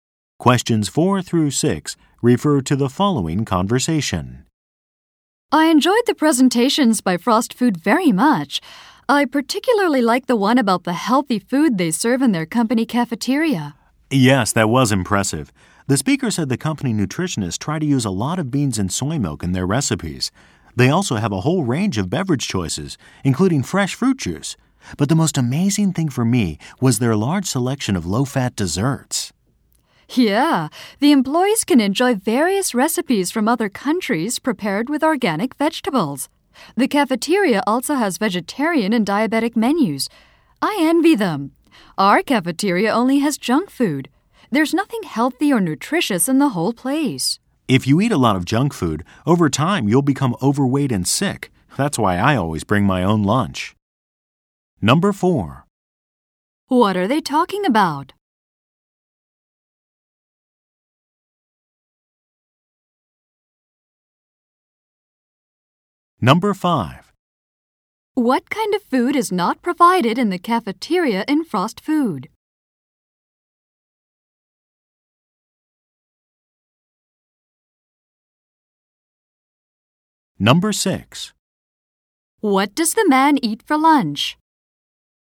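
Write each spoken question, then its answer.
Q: What are they talking about?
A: The healthy food in Frost Food's company cafeteria

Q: What does the man eat for lunch?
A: His own lunch that he brings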